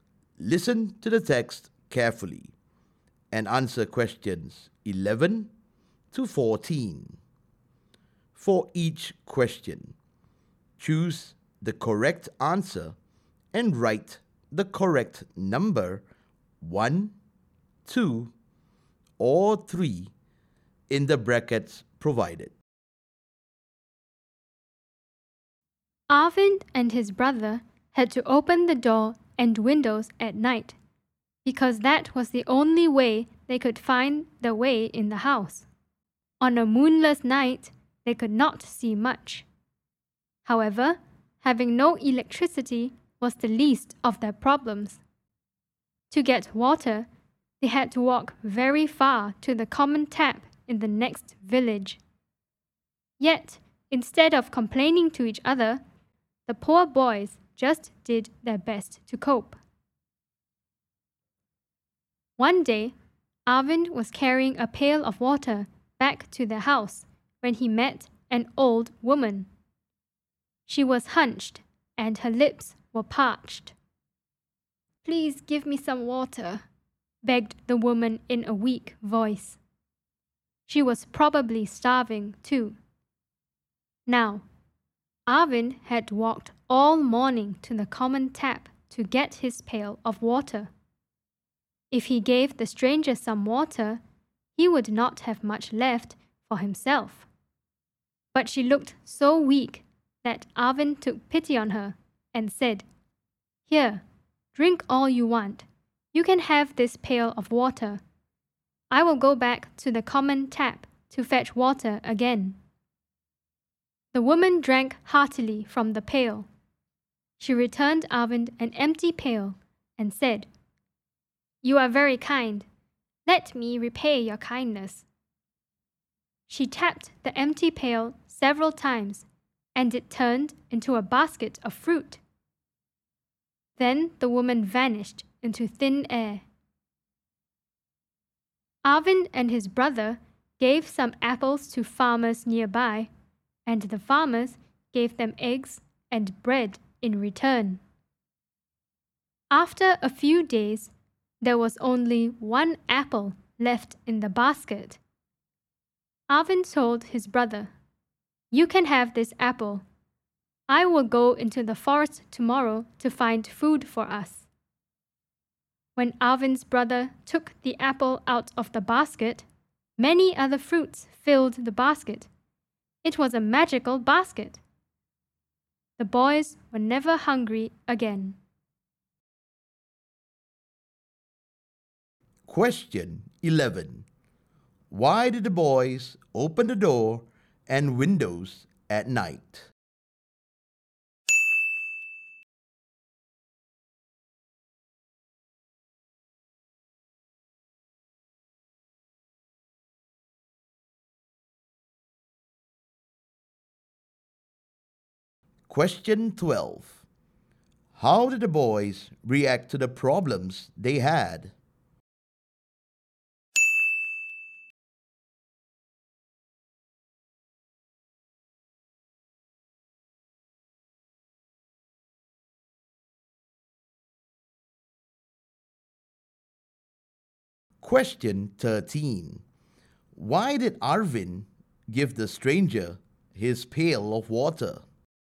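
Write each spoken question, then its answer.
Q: Why did the boys open the door and windows at night?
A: Because that was the only way they could find the way in the house (they had no electricity).

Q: How did the boys react to the problems they had?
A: They did not complain to each other; they just did their best to cope.

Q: Why did Arvind give the stranger his pail of water?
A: She looked so weak that he took pity on her.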